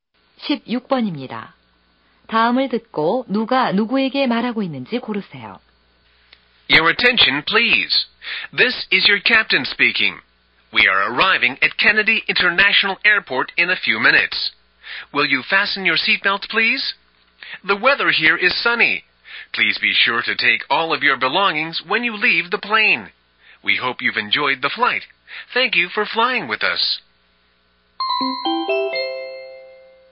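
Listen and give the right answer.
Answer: 기장이 승객들에게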